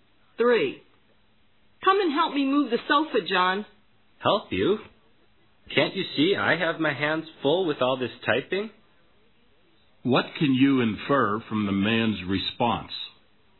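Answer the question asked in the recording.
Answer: He is too busy typing to help.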